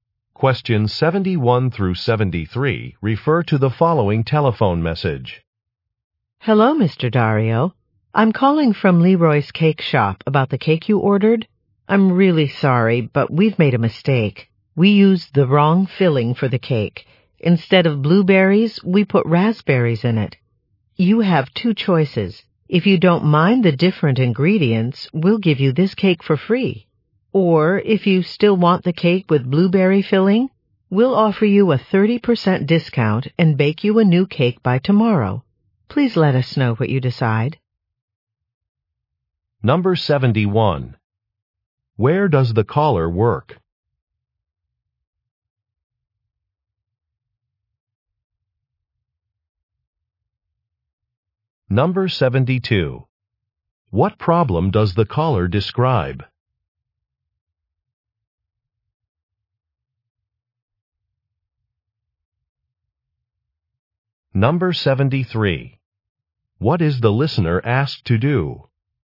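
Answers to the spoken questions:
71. At a cake shop (Leroy's Cake Shop)
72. The wrong filling was used in the cake
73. Let the shop know what he decides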